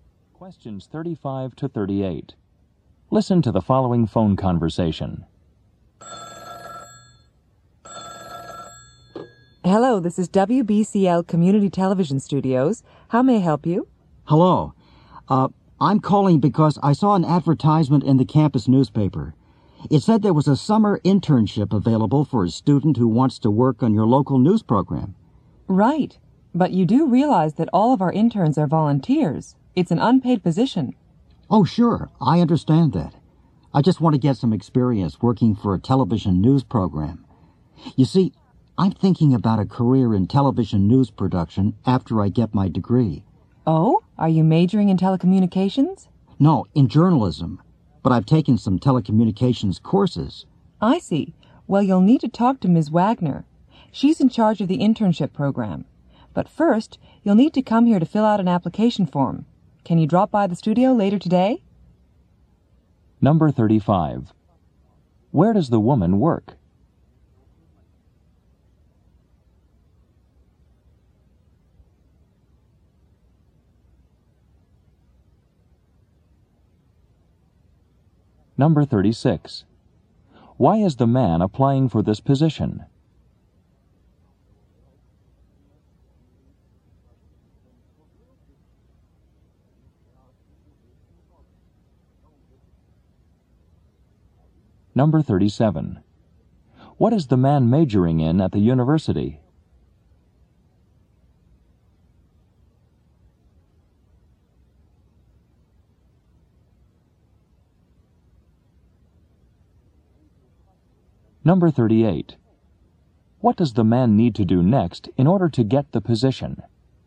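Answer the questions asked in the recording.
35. At a community television studio
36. To get experience working on a TV news program
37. Journalism
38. Come to the studio to fill out an application form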